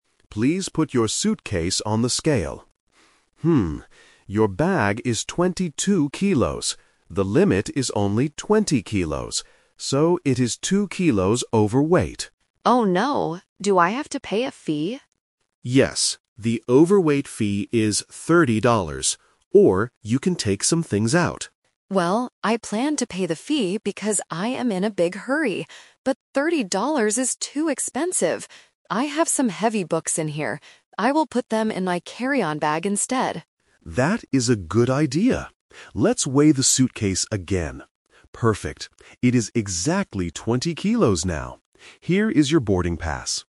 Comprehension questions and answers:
Listen to the conversation between a passenger and a check-in agent. Choose the best answer (A, B, or C).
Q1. What is the weight limit for the suitcase?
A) 2 kilos.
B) 20 kilos.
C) 22 kilos.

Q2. What does the passenger decide to do?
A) Pay the 30-dollar fee.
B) Take out some books.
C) Throw away some clothes.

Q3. Where will the passenger put the things she takes out?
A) In her carry-on bag.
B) In her pockets.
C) In a plastic bag.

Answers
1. B
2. B
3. A

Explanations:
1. The agent clearly states, "The limit is only 20 kilos." Option (C) is The Trap because 22 kilos is the current weight of the bag, not the limit. Option (A) is the overweight amount.
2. This is "The Twist". The passenger says, "I planned to pay the fee" (Option A - The Trap), but she changed her mind because it was too expensive. Her final decision is to take out "some heavy books". Option (C) is a plausible action but is never mentioned.
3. The passenger says, "I will put them in my carry-on bag instead." Options (B) and (C) are possible places to put things, but they are not mentioned in the audio.

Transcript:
Agent: Please put your suitcase on the scale. your bag is 22 kilos. The limit is only 20 kilos. So, it is two kilos overweight.
Passenger: Oh no! Do I have to pay a fee?
Agent: Yes. The overweight fee is 30 dollars. Or, you can take some things out.
Passenger: Well, I planned to pay the fee because I am in a big hurry. But 30 dollars is too expensive! I have some heavy books in here. I will put them in my carry-on bag instead.
Agent: That is a good idea. Let's weigh the suitcase again. Perfect, it is exactly 20 kilos now. Here is your boarding pass.

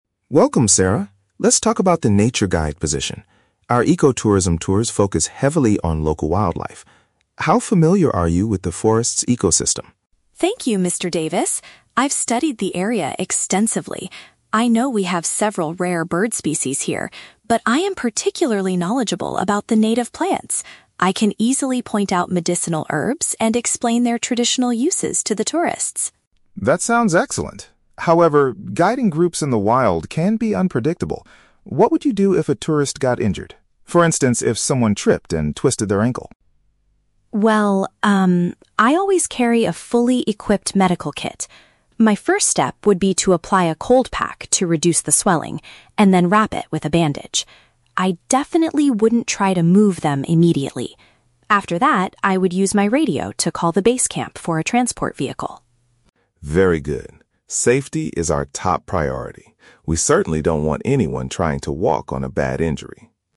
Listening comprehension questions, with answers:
Listen to a job interview between a nature reserve manager and a candidate. Choose the correct answer (A, B, or C) for each question.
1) What is Sarah's strongest area of knowledge regarding the local ecosystem?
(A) Identifying different types of rare birds in the trees.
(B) Recognizing local vegetation and its historical uses.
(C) Tracking the movements of large wild animals.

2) How would Sarah initially treat a guest with a hurt ankle?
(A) By cooling the injured area to stop it from getting bigger.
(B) By helping the person stand up and stretch their legs.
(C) By giving them some strong painkillers from her medical bag.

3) How does Sarah plan to get the injured tourist back to the main office?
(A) By requesting a car using her communication device.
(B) By asking them to walk very slowly on the bad leg.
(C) By carrying them on her back to the nearest road.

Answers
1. B
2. A
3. A

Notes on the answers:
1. Sarah says she is particularly knowledgeable about "native plants" and can explain their "traditional uses". This is paraphrased in option B as "local vegetation and its historical uses".
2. Sarah states her first step is to apply a "cold pack to reduce the swelling" (paraphrased as "cooling the injured area to stop it from getting bigger").
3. Sarah says she would use her "radio" (communication device) to call the base camp for a "transport vehicle" (requesting a car).

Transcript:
Mr.
Let's talk about the Nature Guide position. Our ecotourism tours focus heavily on local wildlife. How familiar are you with the forest's ecosystem?
Sarah: Thank you, Mr. Davis. I've studied the area extensively. I know we have several rare bird species here, but I am particularly knowledgeable about the native plants. I can easily point out medicinal herbs and explain their traditional uses to the tourists.
Mr. Davis: That sounds excellent. However, guiding groups in the wild can be unpredictable. What would you do if a tourist got injured? For instance, if someone tripped and twisted their ankle?
Sarah: Well, um, I always carry a fully equipped medical kit. My first step would be to apply a cold pack to reduce the swelling, and then wrap it with a bandage. I definitely wouldn't try to move them immediately. After that, I would use my radio to call the base camp for a transport vehicle.
Mr. Davis: Very good. Safety is our top priority. We certainly don't want anyone trying to walk on a bad injury.

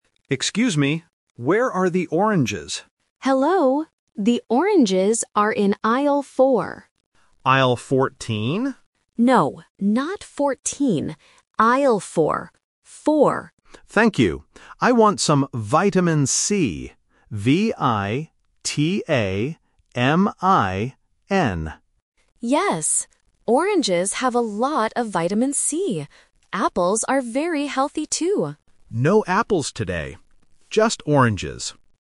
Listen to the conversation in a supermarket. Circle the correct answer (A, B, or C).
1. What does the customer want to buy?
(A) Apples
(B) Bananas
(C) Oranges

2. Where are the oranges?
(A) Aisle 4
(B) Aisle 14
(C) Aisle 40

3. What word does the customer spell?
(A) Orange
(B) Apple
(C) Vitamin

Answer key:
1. C
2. A
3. C

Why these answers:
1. The customer asks, "Where are the oranges?" and at the end says, "Just oranges." Option A (Apples) is the main trap because the employee mentions them, but the customer says "No apples today." Option B (Bananas) is a plausible fruit but is not in the audio.
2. The employee says the oranges are in "Aisle 4" and repeats the word "Four". Option B (Aisle 14) is a trap because the customer guesses it incorrectly, and the employee says "No, not 14." Option C (Aisle 40) is a common A1 phonetic trap because "Four", "Fourteen", and "Forty" sound similar.
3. The customer clearly spells the word "V-I-T-A-M-I-N". Options A and B are mentioned in the conversation, but they are not spelled out letter by letter.

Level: A1

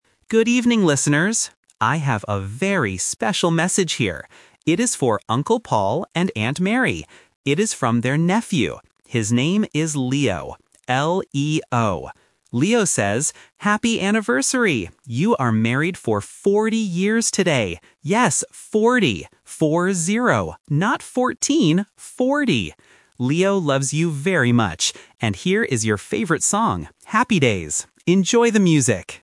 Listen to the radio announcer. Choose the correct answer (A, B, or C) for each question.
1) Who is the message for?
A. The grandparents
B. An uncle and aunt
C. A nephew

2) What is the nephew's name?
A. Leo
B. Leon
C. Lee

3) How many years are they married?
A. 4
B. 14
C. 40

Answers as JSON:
{"1": "B", "2": "A", "3": "C"}

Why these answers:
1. The announcer clearly states, "It is for Uncle Paul and Aunt Mary." Option C (nephew) is the main trap because the nephew is the person sending the message, not the person receiving it. Option A (grandparents) is a family word but is never mentioned.
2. The announcer spells the name of the nephew clearly: L-E-O. Option B (Leon) and Option C (Lee) are traps. They are similar names used to test if the listener caught the exact letters being spelled.
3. The announcer says they are married for "40 years" and repeats "Four-zero". Option B (14) is the phonetic trap; the announcer explicitly says "Not fourteen" to help clear the confusion. Option A (4) is just a number trap.

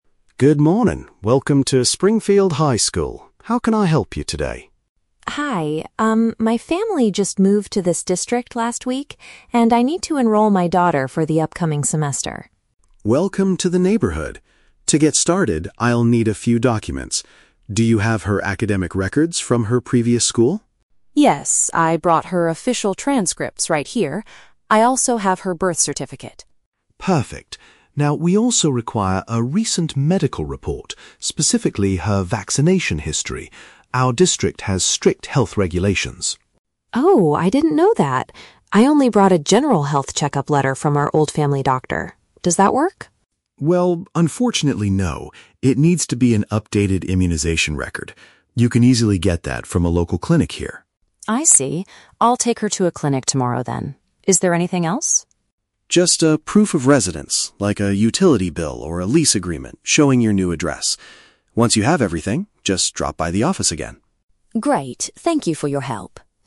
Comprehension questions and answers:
Listen to the conversation between a parent and a school office clerk, and choose the correct answer (A, B, or C) for each question.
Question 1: Why is Mrs. Parker visiting the school office?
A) To ask for a copy of her daughter's academic records.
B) To register her child for the new academic term.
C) To apply for a job as a school office assistant.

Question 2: Which document was rejected by the school clerk?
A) The official certificate of birth.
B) A utility bill showing her current address.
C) A basic medical letter from her previous physician.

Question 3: What does the clerk suggest Mrs. Parker do next regarding the health requirements?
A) Go to a nearby medical center to obtain the correct form.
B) Visit her old family doctor in the previous town.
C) Submit the health documents directly via the school website.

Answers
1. B
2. C
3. A

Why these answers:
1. The Key: Mrs. Parker states, "I need to enroll my daughter for the upcoming semester." Option B paraphrases "enroll" as "register" and "upcoming semester" as "new academic term". The Trap: Option (A) is a trap. She brought the "academic records" with her; she is not asking the new school to give her a copy. Option (C) is plausible for someone visiting a school office but is not mentioned.
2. The Key: Mrs. Parker asks if a "general health check-up letter from our old family doctor" works, and the clerk says, "unfortunately, no". Option C paraphrases this accurately ("basic medical letter from her previous physician"). The Trap: Option (A) is a trap because the birth certificate was accepted ("Perfect"). Option (B) mentions the "utility bill", which is actually a requested document for proof of residence at the end of the audio, not a rejected document.
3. The Key: The clerk tells her, "You can easily get that from a local clinic here." Option A paraphrases "local clinic here" as "nearby medical center". The Trap: Option (B) contains the words "old family doctor", which is mentioned in the audio, but the clerk explicitly tells her to go to a clinic here (in the new town), not back to her previous doctor. Option (C) is a logical guess for modern school systems but is never mentioned.

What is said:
Evans: Good morning, welcome to Springfield High School. How can I help you today?
Parker: Hi, um, my family just moved to this district last week, and I need to enroll my daughter for the upcoming semester.
Evans: Welcome to the neighborhood! To get started, I'll need a few documents. Do you have her academic records from her previous school?
Parker: Yes, I brought her official transcripts right here. I also have her birth certificate.
Evans: Perfect. Now, we also require a recent medical report, specifically her vaccination history. Our district has strict health regulations.
Parker: Oh, I didn't know that. I only brought a general health check-up letter from our old family doctor. Does that work?
Evans: Well, unfortunately, no. It needs to be an updated immunization record. You can easily get that from a local clinic here.
Parker: I see. I'll take her to a clinic tomorrow then. Is there anything else?
Evans: Just a proof of residence, like a utility bill or a lease agreement showing your new address.

